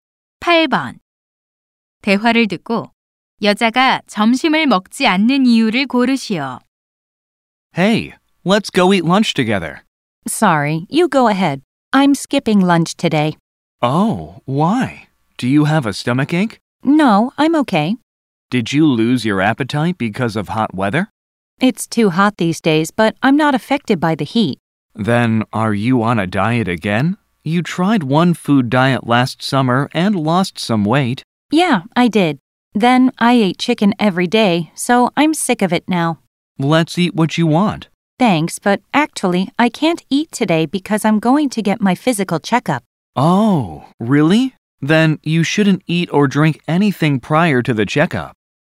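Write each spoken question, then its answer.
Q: 대화를 듣고 여자가 점심을 먹지 않는 이유를 고르시오.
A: 건강 검진을 받을 예정이라서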